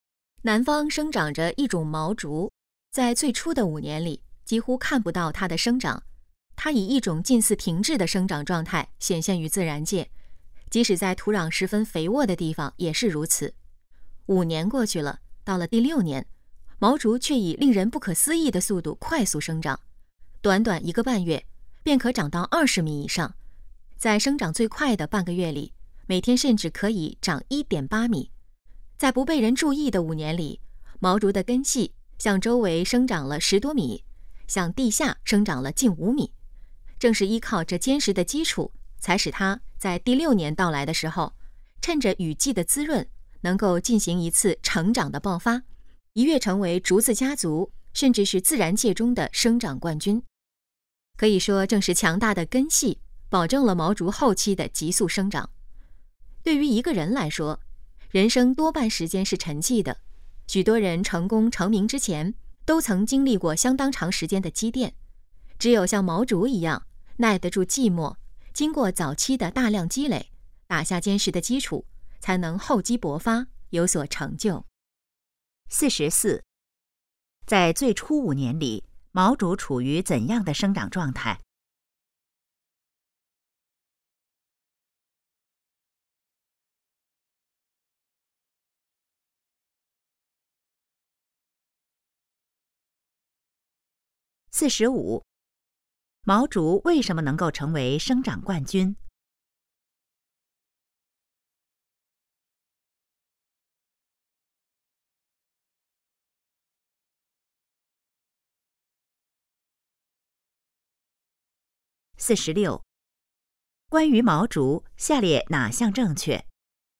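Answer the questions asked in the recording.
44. 近似停滞
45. 有强大的根系作为坚实基础
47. 要耐得住寂寞,打好基础,厚积薄发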